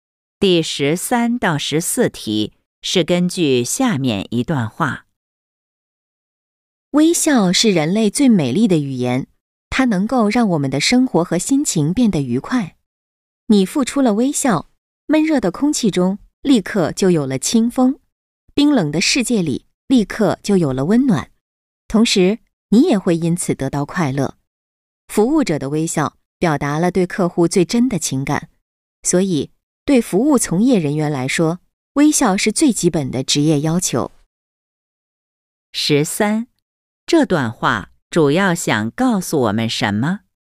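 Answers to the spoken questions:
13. 微笑很重要,能让生活和心情愉快
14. 服务从业人员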